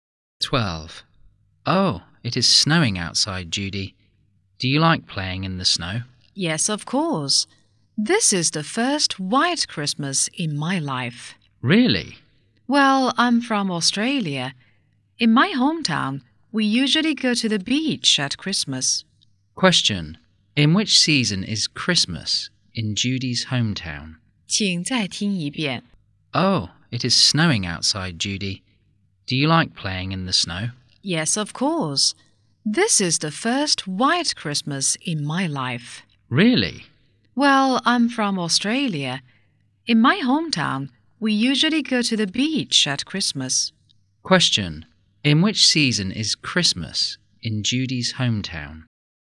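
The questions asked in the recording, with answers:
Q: Question. In which season is Christmas in Judy's hometown?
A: Summer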